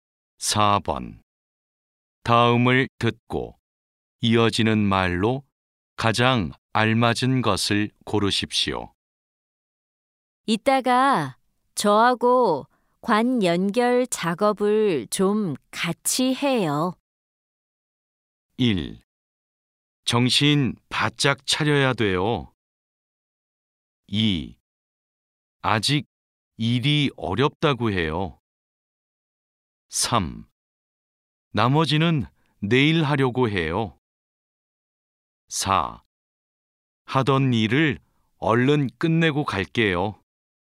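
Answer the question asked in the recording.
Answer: 4: 하던 일을 얼른 끝내고 갈게요.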